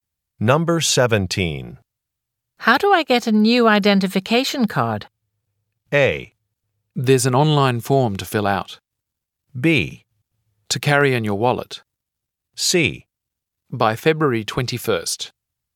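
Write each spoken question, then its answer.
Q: How do I get a new identification card?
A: A: There's an online form to fill out.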